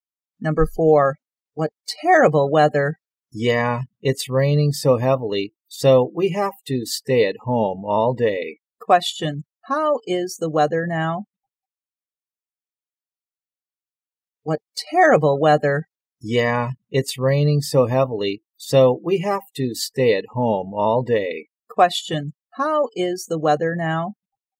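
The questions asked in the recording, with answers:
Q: Question, how is the weather now?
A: Rainy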